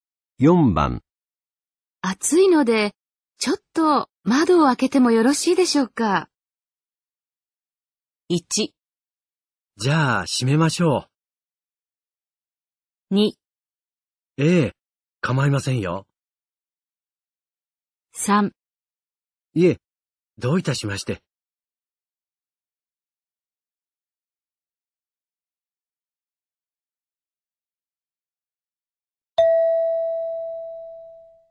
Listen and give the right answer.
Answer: 2

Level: N3 Listening · Test 15